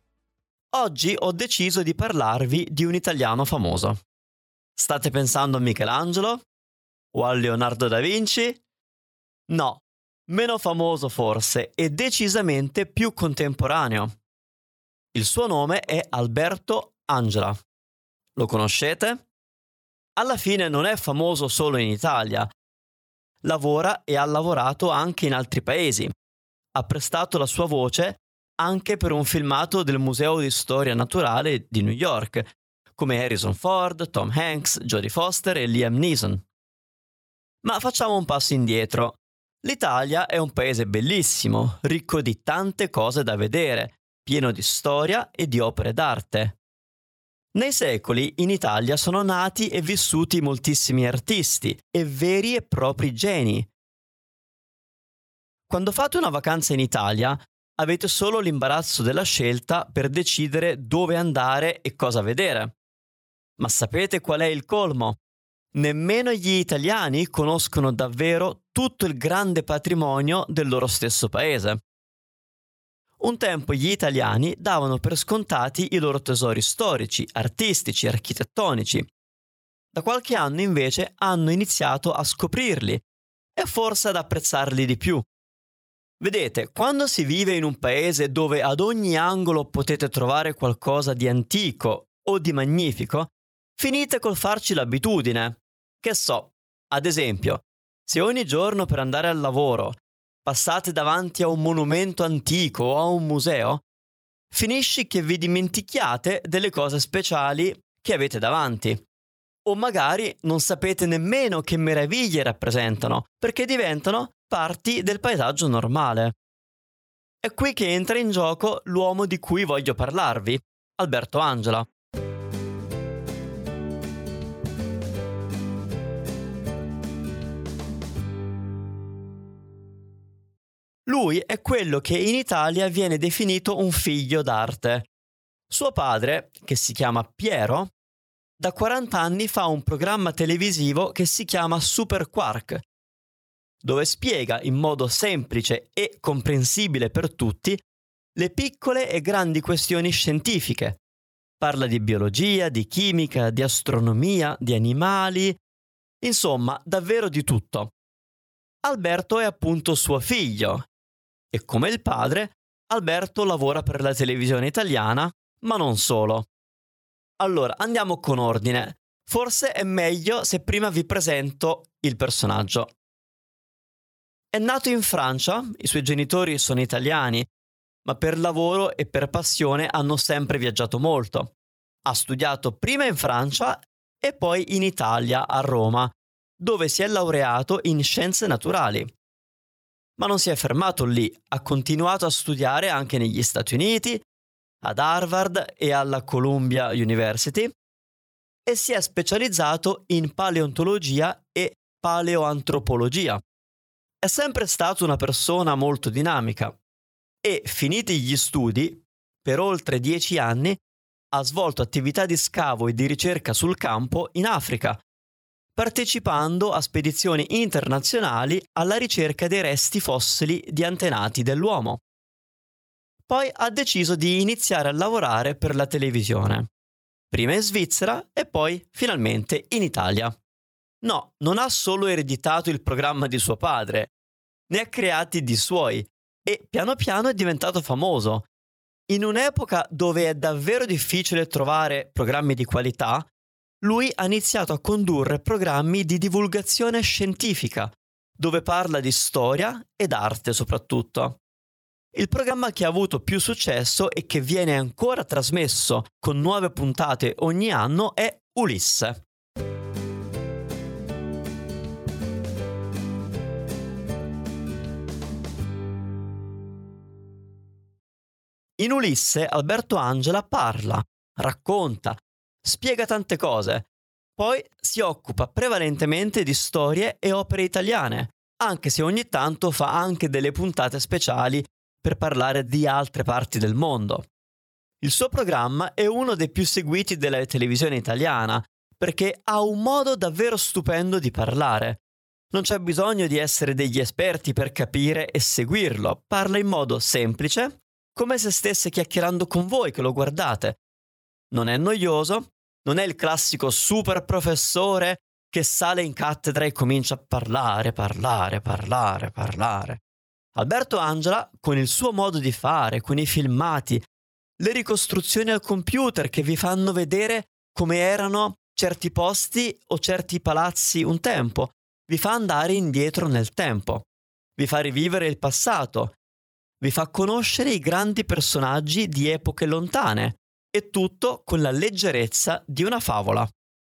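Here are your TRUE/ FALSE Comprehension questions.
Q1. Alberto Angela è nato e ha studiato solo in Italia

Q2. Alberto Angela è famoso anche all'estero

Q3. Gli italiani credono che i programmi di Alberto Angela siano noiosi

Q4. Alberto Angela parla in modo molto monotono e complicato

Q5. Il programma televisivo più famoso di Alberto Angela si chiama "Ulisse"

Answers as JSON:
{"1": "Falso", "2": "Vero", "3": "Falso", "4": "Falso", "5": "Vero"}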